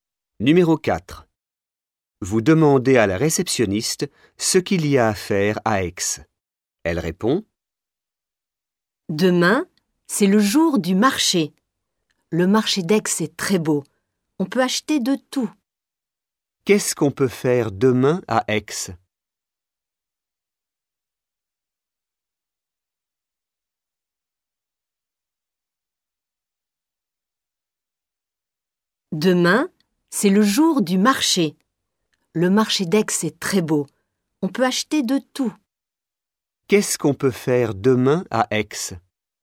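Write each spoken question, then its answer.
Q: Qu'est-ce qu'on peut faire demain à Aix?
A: Aller au marché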